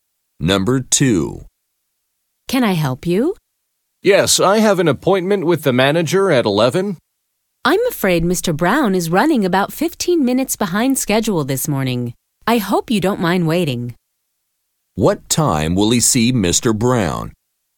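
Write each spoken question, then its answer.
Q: What time will he see Mr. Brown?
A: At 11:15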